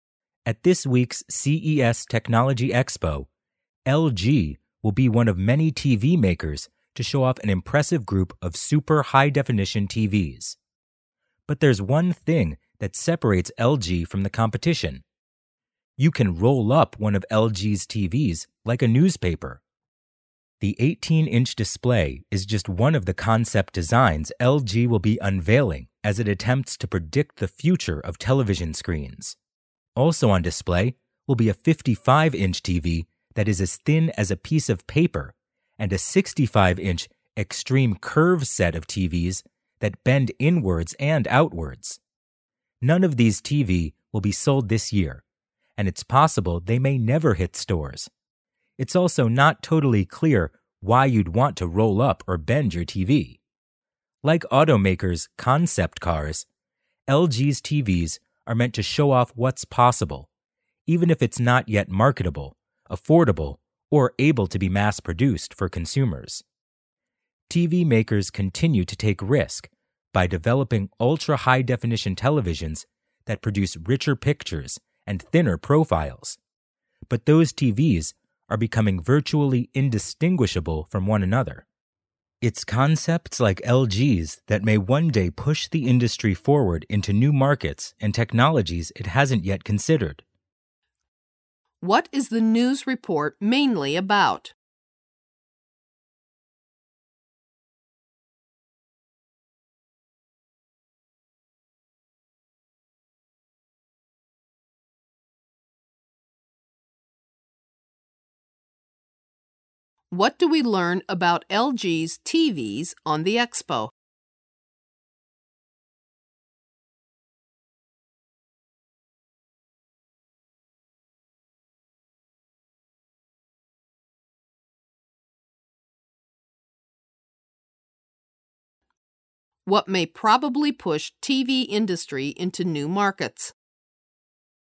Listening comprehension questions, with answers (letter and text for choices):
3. What is the news report mainly about?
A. LG has exposed new concept TVs.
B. The market of TVs decreased.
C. TV will be replaced by computers.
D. LG is lagging behind in the TV competition.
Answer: A. LG has exposed new concept TVs.

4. What do we learn about LG's TVs on the expo?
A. They will be sold in stores this year.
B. They will be mass-produced.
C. The price of them is not very high.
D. One of them can be rolled up like a newspaper.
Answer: D. One of them can be rolled up like a newspaper.

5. What may probably push TV industry into new markets?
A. CES technology expo.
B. Ultra-high definition televisions.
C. Distinguishable technology.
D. Creative concepts like LG's.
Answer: D. Creative concepts like LG's.

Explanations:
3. 新闻一开始说LG在CES科技展上发布了一款新电视机。之后新闻就介绍了这款新电视的特点以及是否作零售等情况,本篇新闻都是围绕这款新电视机而展开的,所以答案选A项。 B项"电视机的市场份额减少"和C项"电视将被电脑取代"均没有在新闻中提到。D项"LG公司在电视机市场的竞争中落后了"是对文意误解,新闻中的separates LG from the competition是指LG公司的新电视使它不同于其他竞争对手。
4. 关于展会上的LG电视,新闻中提到其中一款"可以像报纸一样卷起来"(roll up...like a newspaper),所以答案选D项。 新闻中提到,展会上的所有电视都不会出售(None of these TV will be sold this year),而且像"概念车"这些车大众消费不起,也不能大量生产(not...affordable and able to be mass-produced for customers)。A项"今年将在商店出售"、B项"可以大量生产"和C项"价格不高"均与新闻提到的内容相反。
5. 新闻的末尾提到,正是像LG公司这样的概念才能使该行业进入新的市场(push the industry forward into new markets),而其中的concepts like LG's就是指该公司提出的可以弯曲的电视之类的概念,这些都是创新的概念,故答案选D项。 A项"CES科技展"只是在新闻一开始提到,是LG公司展示新产品的平台,与题目无关。新闻中提到一些厂家生产的高清电视(ultra-

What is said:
A B C D A [听力原文] At this week's CES technology expo, LG will be one of many TV makers to show off an impressive group of super-high-definition TVs. But there's one thing that separates LG from the competition. You can roll up one of LG's TVs like a newspaper. The 18-inch display is just one of the concept designs LG will be unveiling, as it attempts to predict the future of television screens. Also on display will be a 55-inch TV that is as thin as a piece of paper and a 65-inch "extreme-curve" set of TVs that bend inwards and outwards. None of these TV will be sold this year—and it's possible they may never hit stores. It's also not totally clear why you'd want to roll up or bend your TV. Like automakers' "concept cars", LG's TVs are meant to show off what's possible, even if it's not yet marketable, affordable or able to be mass-produced for consumers. TV makers continue to take a risk, by developing ultra-high definition televisions that produce richer pictures, and thinner profiles. But those TVs are becoming virtually indistinguishable from one another. It's concepts like LG's that may one day push the industry, forward into new markets and technologies it hasn't yet considered.

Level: 大学英语四级